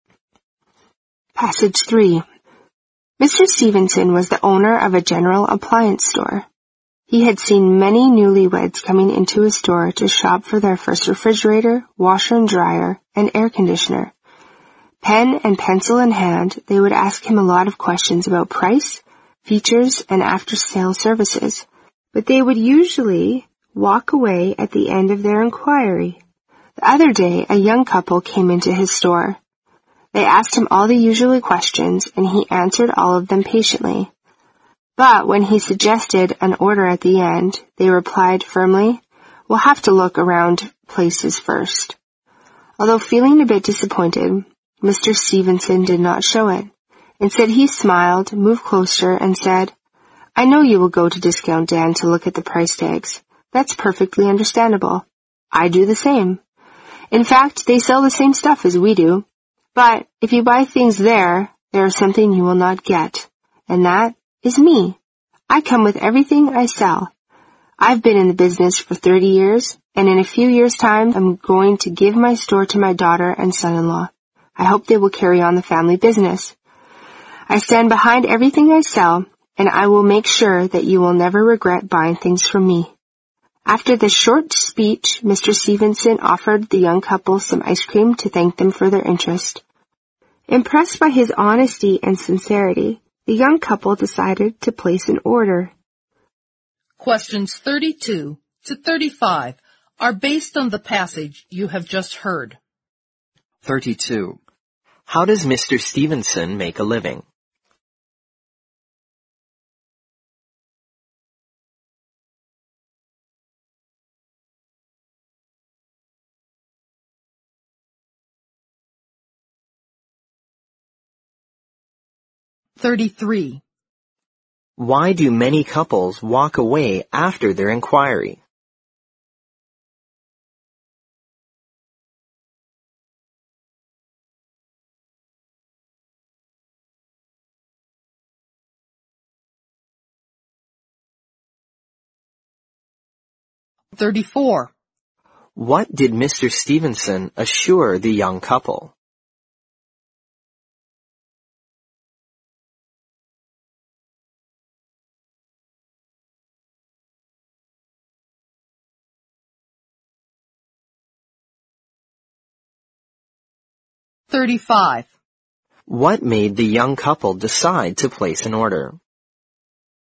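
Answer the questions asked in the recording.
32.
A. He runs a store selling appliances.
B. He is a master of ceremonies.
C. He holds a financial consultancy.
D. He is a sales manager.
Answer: A. He runs a store selling appliances.
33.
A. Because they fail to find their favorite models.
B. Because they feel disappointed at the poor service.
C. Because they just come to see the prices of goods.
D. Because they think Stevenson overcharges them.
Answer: C. Because they just come to see the prices of goods.
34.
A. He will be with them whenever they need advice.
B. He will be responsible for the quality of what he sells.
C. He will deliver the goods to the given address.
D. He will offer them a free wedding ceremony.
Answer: B. He will be responsible for the quality of what he sells.
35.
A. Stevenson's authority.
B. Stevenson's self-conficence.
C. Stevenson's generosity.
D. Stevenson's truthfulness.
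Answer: D. Stevenson's truthfulness.

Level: 英语四级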